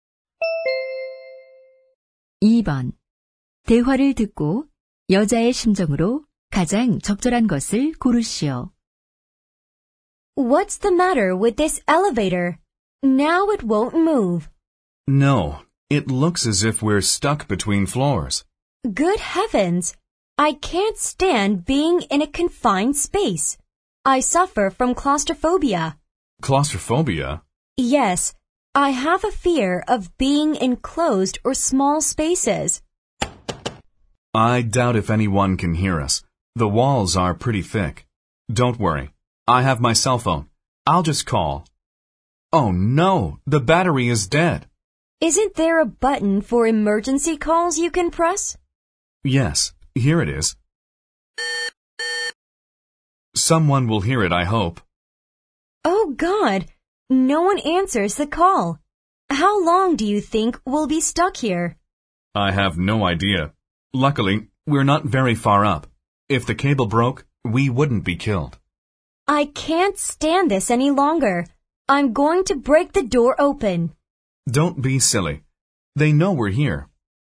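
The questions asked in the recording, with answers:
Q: 대화를 듣고 여자의 심정으로 가장 적절한 것을 고르시오.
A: 겁에 질린, 불안한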